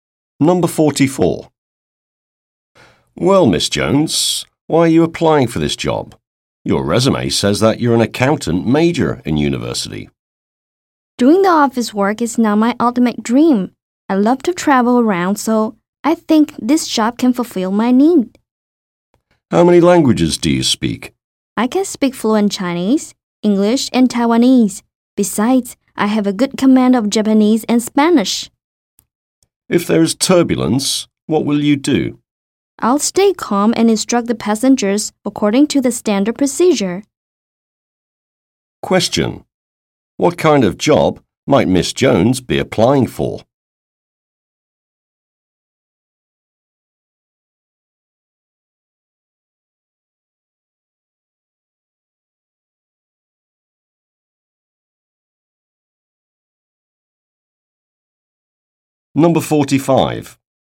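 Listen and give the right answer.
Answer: Flight attendant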